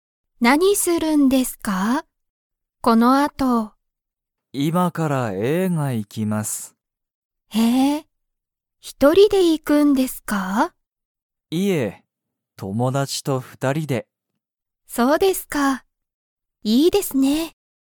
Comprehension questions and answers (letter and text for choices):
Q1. 鈴木すずきさんは、一人ひとりで映画えいがに行いきますか?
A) はい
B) いいえ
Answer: B) いいえ

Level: Level 1